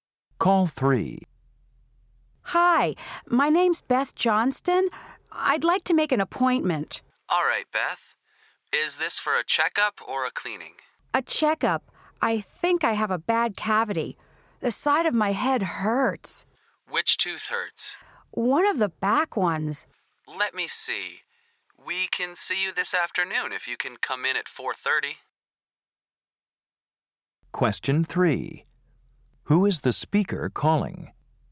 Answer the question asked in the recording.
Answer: Dental clinic. This is Mr.